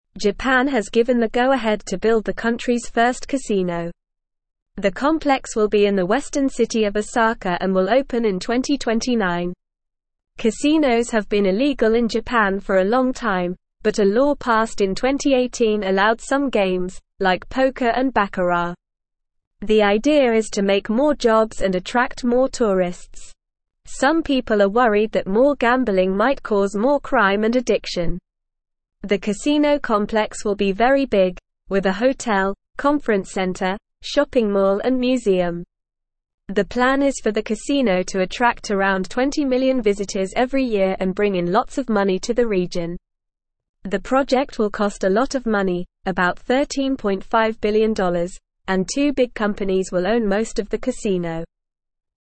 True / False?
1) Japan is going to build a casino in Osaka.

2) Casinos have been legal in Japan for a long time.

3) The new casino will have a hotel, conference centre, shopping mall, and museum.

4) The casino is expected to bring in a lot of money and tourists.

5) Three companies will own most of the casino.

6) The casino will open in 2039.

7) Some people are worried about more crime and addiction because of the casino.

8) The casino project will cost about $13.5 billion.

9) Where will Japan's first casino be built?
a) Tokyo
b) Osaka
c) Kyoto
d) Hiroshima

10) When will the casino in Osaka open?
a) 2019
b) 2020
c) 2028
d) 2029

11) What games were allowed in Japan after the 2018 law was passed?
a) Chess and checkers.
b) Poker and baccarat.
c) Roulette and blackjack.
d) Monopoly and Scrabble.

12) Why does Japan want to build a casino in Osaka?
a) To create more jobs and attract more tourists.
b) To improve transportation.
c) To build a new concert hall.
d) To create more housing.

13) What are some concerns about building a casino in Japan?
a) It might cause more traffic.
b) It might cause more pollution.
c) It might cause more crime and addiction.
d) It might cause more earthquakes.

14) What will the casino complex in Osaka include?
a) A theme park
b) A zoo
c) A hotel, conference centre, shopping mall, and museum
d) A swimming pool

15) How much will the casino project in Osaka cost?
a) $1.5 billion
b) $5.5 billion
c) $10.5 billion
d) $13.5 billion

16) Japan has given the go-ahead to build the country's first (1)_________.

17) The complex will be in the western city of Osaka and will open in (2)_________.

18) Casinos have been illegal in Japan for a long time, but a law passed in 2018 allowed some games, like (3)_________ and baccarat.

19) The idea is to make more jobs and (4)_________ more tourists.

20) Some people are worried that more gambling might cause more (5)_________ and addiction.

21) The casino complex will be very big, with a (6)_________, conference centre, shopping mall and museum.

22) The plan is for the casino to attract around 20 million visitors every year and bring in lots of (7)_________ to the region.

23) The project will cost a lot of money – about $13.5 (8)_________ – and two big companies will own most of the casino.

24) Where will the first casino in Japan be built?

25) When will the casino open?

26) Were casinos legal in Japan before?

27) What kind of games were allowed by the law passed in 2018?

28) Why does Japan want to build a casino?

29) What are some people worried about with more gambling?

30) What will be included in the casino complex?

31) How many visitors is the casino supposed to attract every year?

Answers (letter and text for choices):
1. True
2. False
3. True
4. True
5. False
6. False
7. True
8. True
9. b) Osaka
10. d) 2029
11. b) Poker and baccarat.
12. a) To create more jobs and attract more tourists.
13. c) It might cause more crime and addiction.
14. c) A hotel, conference centre, shopping mall, and museum
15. d) $13.5 billion
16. casino
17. 2029
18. poker
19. attract
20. crime
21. hotel
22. money
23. billion
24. The first casino in Japan will be built in the western city of Osaka.
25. The casino will open in 2029.
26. No, casinos were illegal in Japan before.
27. The law passed in 2018 allowed some games like poker and baccarat.
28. Japan wants to build a casino to make more jobs and attract more tourists.
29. Some people are worried that more gambling might cause more crime and addiction.
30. The casino complex will include a hotel, conference center, shopping mall, and museum.
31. The casino is supposed to attract around 20 million visitors every year.

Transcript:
Japan has given the go-ahead to build the country's first casino. The complex will be in the western city of Osaka and will open in 2029. Casinos have been illegal in Japan for a long time, but a law passed in 2018 allowed some games, like poker and baccarat. The idea is to make more jobs and attract more tourists. Some people are worried that more gambling might cause more crime and addiction. The casino complex will be very big, with a hotel, conference centre, shopping mall and museum. The plan is for the casino to attract around 20 million visitors every year and bring in lots of money to the region. The project will cost a lot of money – about $13.5 billion – and two big companies will own most of the casino.

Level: Level 1